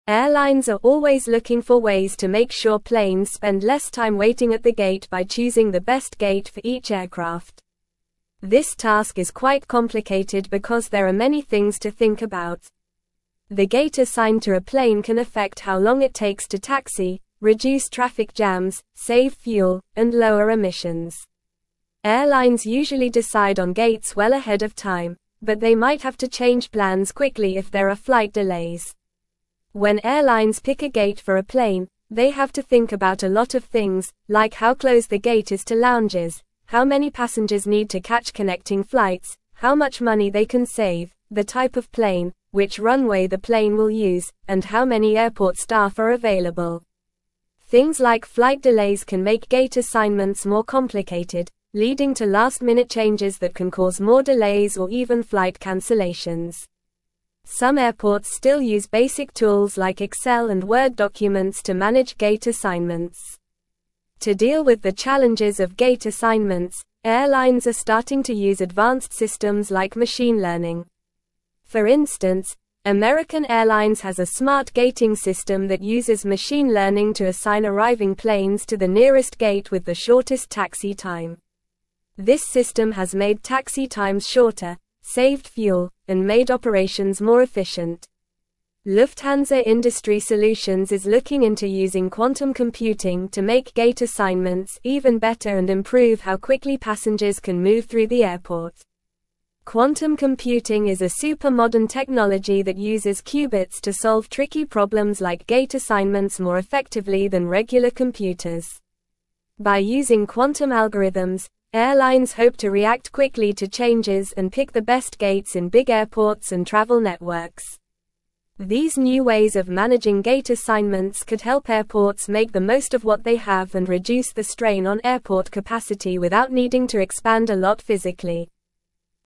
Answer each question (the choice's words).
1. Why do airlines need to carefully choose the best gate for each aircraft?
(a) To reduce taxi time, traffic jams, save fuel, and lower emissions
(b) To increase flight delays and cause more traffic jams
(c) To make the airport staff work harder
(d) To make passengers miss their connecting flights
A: To reduce taxi time, traffic jams, save fuel, and lower emissions

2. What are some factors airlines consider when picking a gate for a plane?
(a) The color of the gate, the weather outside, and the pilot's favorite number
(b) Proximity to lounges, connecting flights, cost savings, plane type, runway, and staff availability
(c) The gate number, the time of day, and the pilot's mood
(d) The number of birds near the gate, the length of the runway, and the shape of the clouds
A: Proximity to lounges, connecting flights, cost savings, plane type, runway, and staff availability

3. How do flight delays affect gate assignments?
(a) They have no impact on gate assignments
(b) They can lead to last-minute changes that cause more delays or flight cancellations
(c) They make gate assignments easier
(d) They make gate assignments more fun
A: They can lead to last-minute changes that cause more delays or flight cancellations

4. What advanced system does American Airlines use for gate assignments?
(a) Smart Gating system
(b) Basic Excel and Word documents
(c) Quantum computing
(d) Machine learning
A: Smart Gating system

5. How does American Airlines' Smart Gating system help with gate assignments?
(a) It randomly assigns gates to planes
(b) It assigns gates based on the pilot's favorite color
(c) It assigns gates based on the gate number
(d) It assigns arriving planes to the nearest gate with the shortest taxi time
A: It assigns arriving planes to the nearest gate with the shortest taxi time

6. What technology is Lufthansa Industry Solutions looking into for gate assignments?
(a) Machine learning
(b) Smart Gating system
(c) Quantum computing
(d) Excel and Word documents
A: Quantum computing

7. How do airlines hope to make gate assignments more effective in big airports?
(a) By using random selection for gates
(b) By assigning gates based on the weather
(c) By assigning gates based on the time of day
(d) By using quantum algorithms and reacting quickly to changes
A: By using quantum algorithms and reacting quickly to changes

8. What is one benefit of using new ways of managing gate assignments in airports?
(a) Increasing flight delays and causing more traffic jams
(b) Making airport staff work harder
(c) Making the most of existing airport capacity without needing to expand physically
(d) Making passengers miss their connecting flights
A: Making the most of existing airport capacity without needing to expand physically

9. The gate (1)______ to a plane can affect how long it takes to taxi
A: assigned

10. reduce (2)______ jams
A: traffic

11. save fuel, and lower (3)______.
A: emissions

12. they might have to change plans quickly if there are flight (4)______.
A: delays

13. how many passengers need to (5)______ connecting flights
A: catch

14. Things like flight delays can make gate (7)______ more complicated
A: assignments

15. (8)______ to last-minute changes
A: leading

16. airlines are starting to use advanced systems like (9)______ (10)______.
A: machine

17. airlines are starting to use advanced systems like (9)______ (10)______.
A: learning

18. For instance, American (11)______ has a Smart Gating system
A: Airlines

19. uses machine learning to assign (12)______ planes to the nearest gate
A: arriving

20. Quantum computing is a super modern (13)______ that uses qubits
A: technology

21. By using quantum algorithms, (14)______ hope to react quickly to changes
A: airlines

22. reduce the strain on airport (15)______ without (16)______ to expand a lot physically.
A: capacity

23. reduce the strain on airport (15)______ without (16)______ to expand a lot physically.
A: needing

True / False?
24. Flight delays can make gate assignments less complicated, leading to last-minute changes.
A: False

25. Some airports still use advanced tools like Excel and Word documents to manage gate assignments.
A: False

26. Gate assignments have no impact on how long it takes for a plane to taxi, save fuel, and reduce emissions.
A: False

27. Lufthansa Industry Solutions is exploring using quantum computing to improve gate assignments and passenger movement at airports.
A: True

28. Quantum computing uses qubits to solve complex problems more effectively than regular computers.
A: True

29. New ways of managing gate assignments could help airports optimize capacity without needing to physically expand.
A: True

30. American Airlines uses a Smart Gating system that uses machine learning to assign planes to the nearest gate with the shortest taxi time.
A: True

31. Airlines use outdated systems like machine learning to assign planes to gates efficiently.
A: False

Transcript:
Airlines are always looking for ways to make sure planes spend less time waiting at the gate by choosing the best gate for each aircraft. This task is quite complicated because there are many things to think about. The gate assigned to a plane can affect how long it takes to taxi, reduce traffic jams, save fuel, and lower emissions. Airlines usually decide on gates well ahead of time, but they might have to change plans quickly if there are flight delays.
When airlines pick a gate for a plane, they have to think about a lot of things, like how close the gate is to lounges, how many passengers need to catch connecting flights, how much money they can save, the type of plane, which runway the plane will use, and how many airport staff are available. Things like flight delays can make gate assignments more complicated, leading to last-minute changes that can cause more delays or even flight cancellations. Some airports still use basic tools like Excel and Word documents to manage gate assignments.
To deal with the challenges of gate assignments, airlines are starting to use advanced systems like machine learning. For instance, American Airlines has a Smart Gating system that uses machine learning to assign arriving planes to the nearest gate with the shortest taxi time. This system has made taxi times shorter, saved fuel, and made operations more efficient. Lufthansa Industry Solutions is looking into using quantum computing to make gate assignments even better and improve how quickly passengers can move through the airport.
Quantum computing is a super modern technology that uses qubits to solve tricky problems like gate assignments more effectively than regular computers. By using quantum algorithms, airlines hope to react quickly to changes and pick the best gates in big airports and travel networks. These new ways of managing gate assignments could help airports make the most of what they have and reduce the strain on airport capacity without needing to expand a lot physically.

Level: Level 3